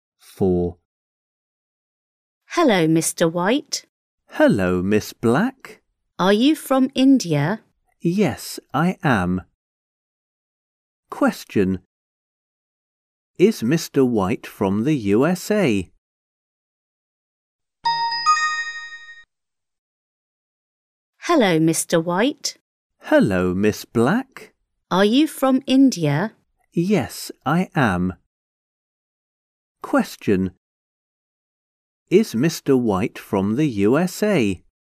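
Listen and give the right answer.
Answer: No, he isn't. He's from India.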